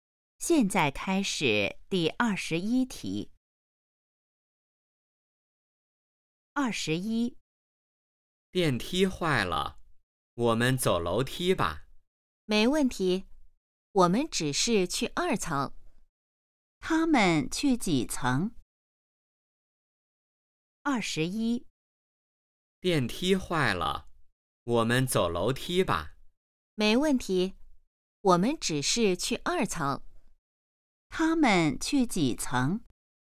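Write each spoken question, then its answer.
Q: 他们去几层?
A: 二层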